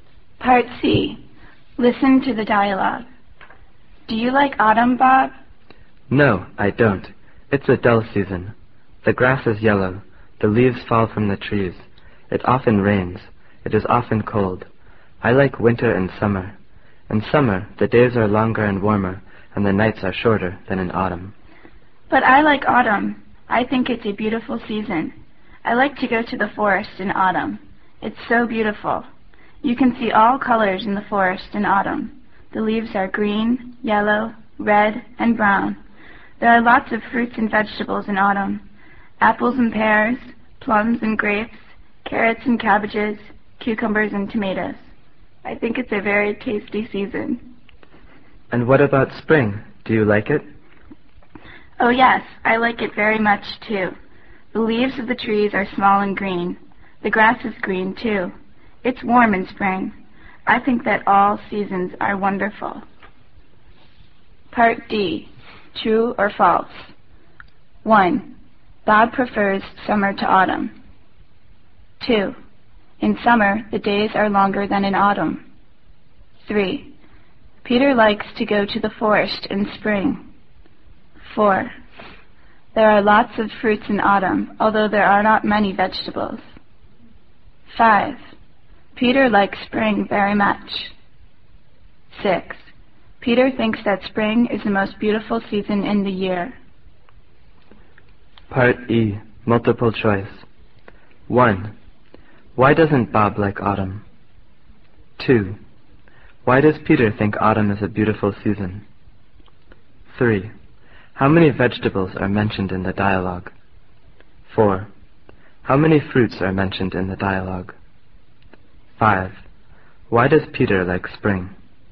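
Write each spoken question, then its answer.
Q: Bob prefers summer to autumn.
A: True

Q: In summer, the days are longer than in autumn.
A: True

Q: Peter likes to go to the forest in spring.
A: False

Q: There are lots of fruits in autumn, although there are not many vegetables.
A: False

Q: Peter likes spring very much.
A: True

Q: Peter thinks that spring is the most beautiful season in the year.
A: False

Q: Why doesn't Bob like autumn?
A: It's a dull season: the grass is yellow, leaves fall, it often rains and is cold

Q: Why does Peter think autumn is a beautiful season?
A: You can see all colors in the forest

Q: How many vegetables are mentioned in the dialogue?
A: Four

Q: How many fruits are mentioned in the dialogue?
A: Four

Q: Why does Peter like spring?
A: The leaves and grass are green and it's warm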